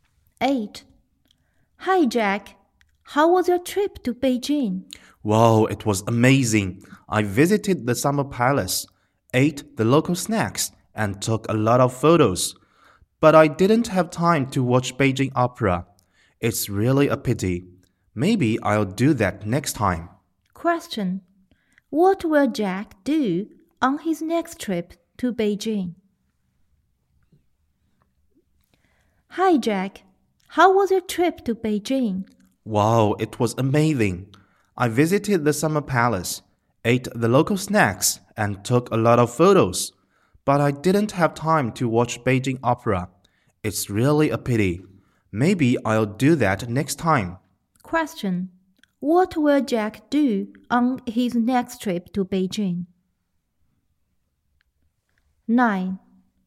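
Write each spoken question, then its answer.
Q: What will Jack do on his next trip to Beijing?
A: Watch Beijing Opera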